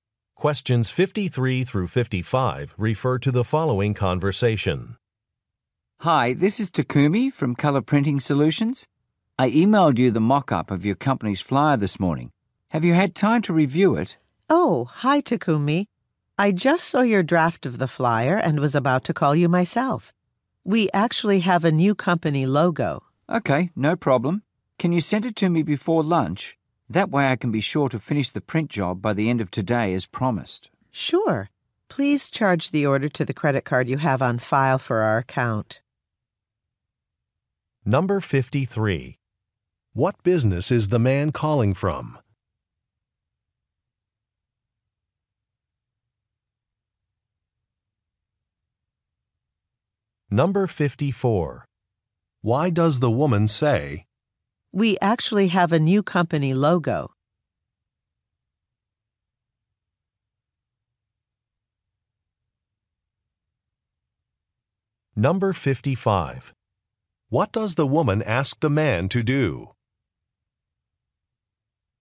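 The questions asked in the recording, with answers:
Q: What business is the man calling from?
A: A printing company

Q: "We actually have a new company logo"?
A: The flyer needs to be changed

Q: What does the woman ask the man to do?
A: Charge the order to the credit card on file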